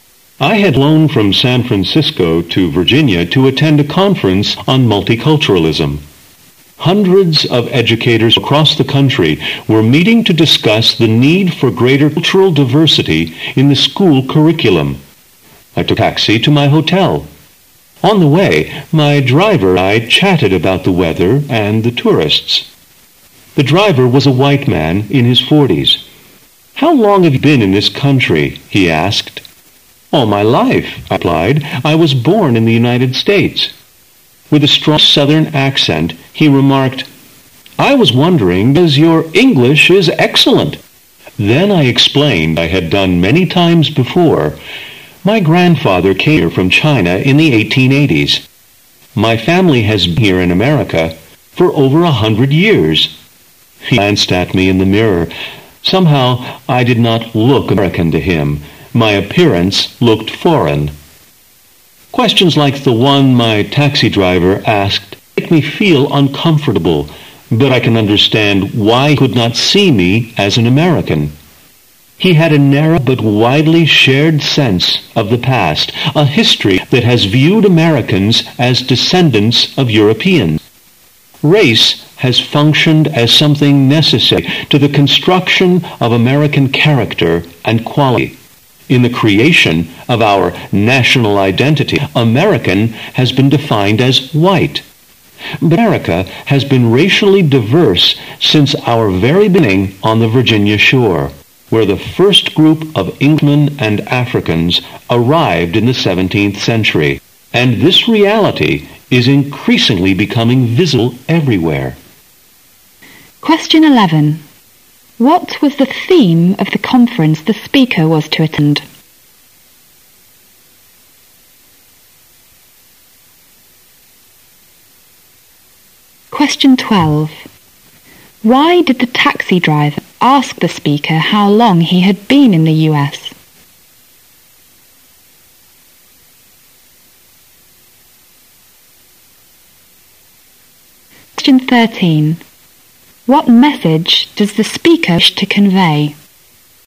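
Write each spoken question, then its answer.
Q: What was the theme of the conference the speaker was to attend?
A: Multiculturalism / greater cultural diversity in the school curriculum

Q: Why did the taxi driver ask the speaker how long he had been in the US?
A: Because the speaker did not look American to him; his appearance looked foreign

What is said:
[解析] 11-13 I had flown from San Francisco to Virginia to at-tend a conference on multiculturalism. Hundreds of educators from across the country were meeting [11]to discuss the need for greater cultural diversity in the school curriculum. I took a taxi to my hotel. On the way, my driver and I chatted about the weather and the tourists, The driver was a white man in his forties. "How long have you been in this country?" he asked. "All my life!" I replied, "I was born in the United States." With a strong southern accent, he remarked, "I was wondering because your English is excellent." Then I explained as I had done many times before, "My grand-father came here from China in the 1880s. 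My family has been here in America for over a hundred years." He glanced at me in the mirror. [12]Somehow, I did not look "American" to him. My appearance looked foreign. Questions like the one my taxi driver asked make me feel uncomfortable. But I can understand why he could not see me as an American. He had a narrow but widely-shared sense of the past: a history that has viewed Americans as descendants of Europeans. Race has functioned as something necessary to the construction of American character and quality, in the creation of our national identity, American has been defined as "white". [13]But America has been racially diverse 'since our very beginning on the Virginia shore, where the first group of Englishmen and Africans arrived in the 17th century. And this reality is increasingly becoming visible everywhere.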